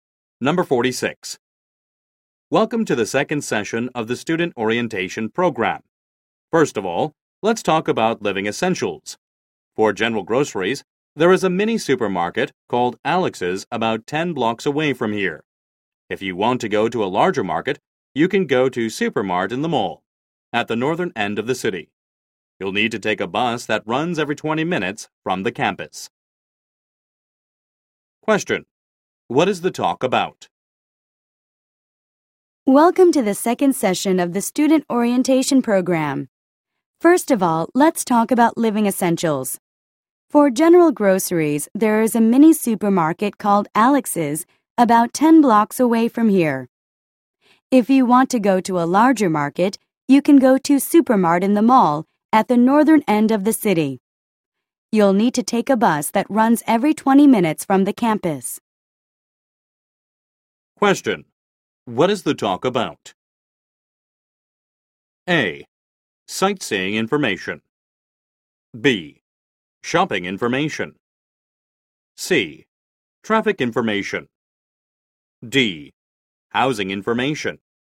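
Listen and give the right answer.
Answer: B: Shopping information.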